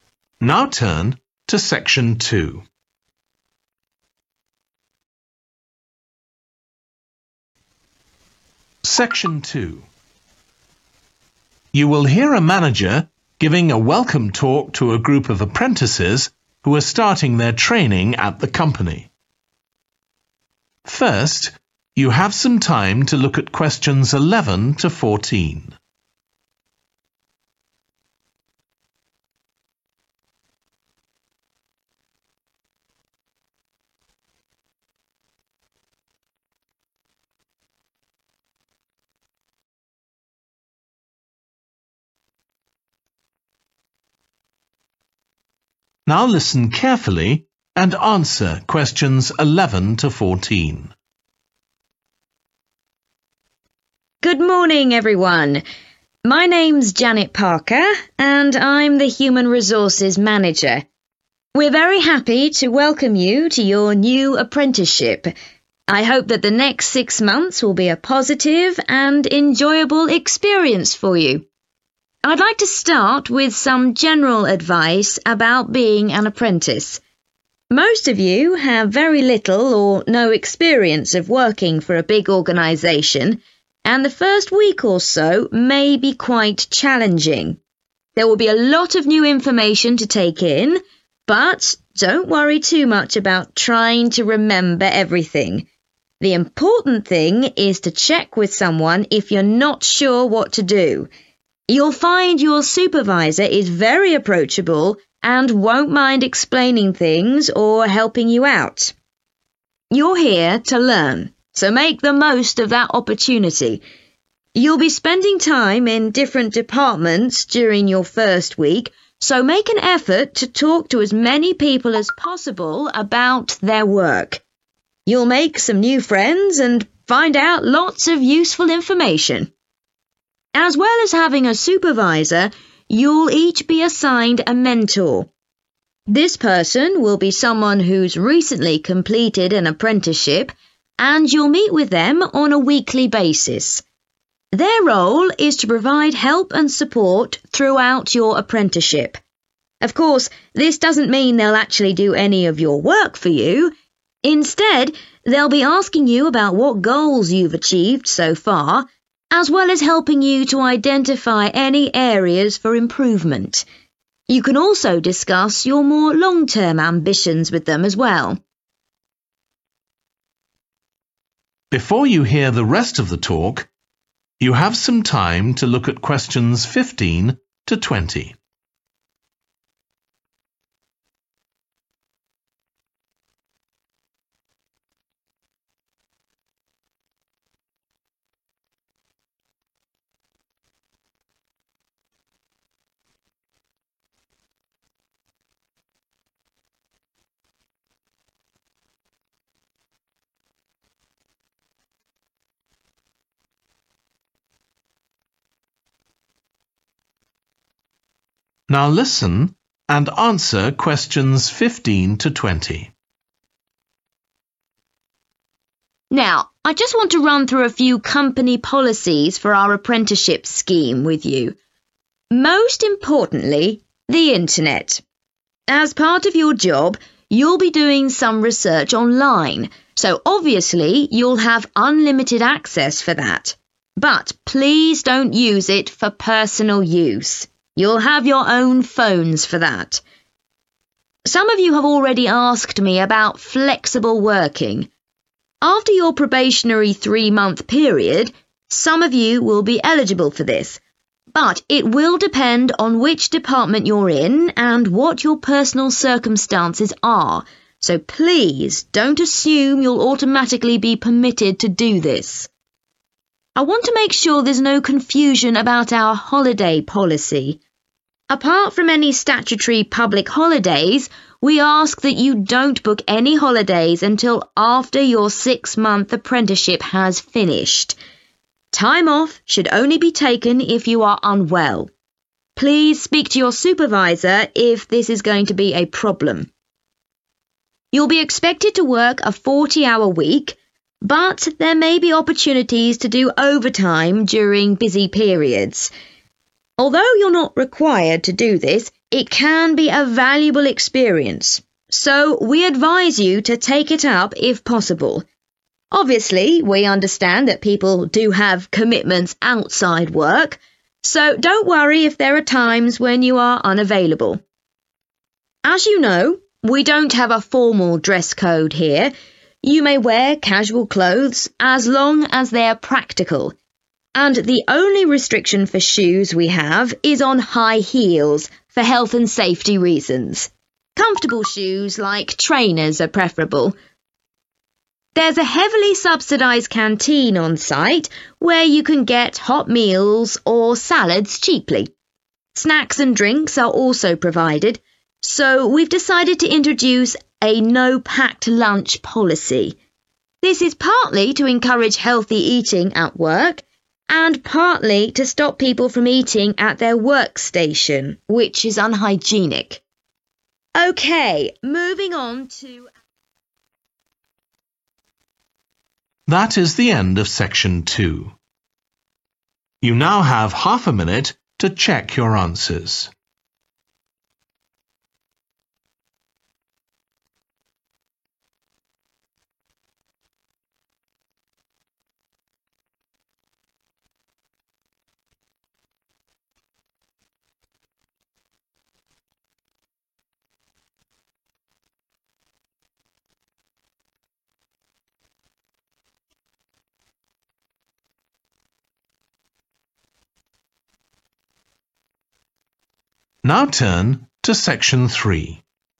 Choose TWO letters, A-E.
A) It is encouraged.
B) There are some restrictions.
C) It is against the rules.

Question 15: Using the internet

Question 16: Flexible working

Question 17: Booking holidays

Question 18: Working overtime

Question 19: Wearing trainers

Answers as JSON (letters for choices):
{"15": "B", "16": "B", "17": "C", "18": "A", "19": "A"}